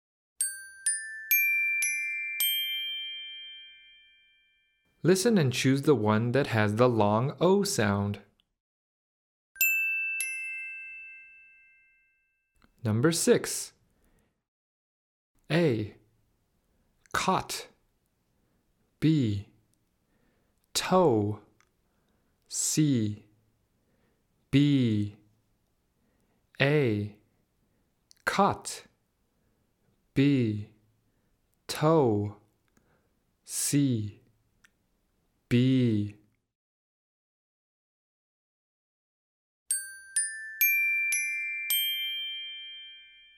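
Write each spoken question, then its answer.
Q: Listen and choose the one that has the long O sound.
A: B: Toe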